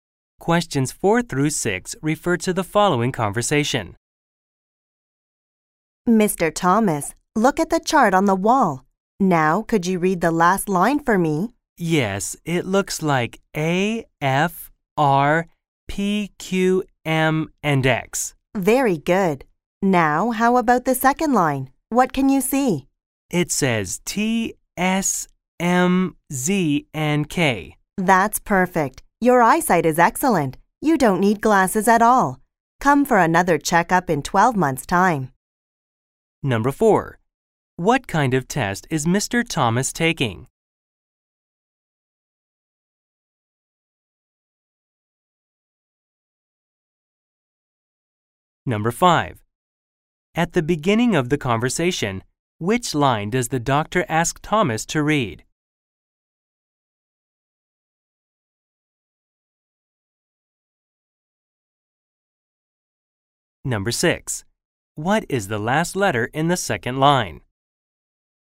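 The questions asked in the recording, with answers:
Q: What kind of test is Mr. Thomas taking?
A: An eye test.

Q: At the beginning of the conversation, which line does the doctor ask Thomas to read?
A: The last line.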